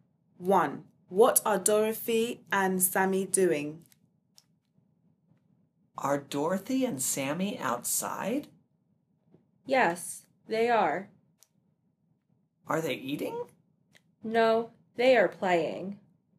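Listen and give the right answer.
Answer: They are playing.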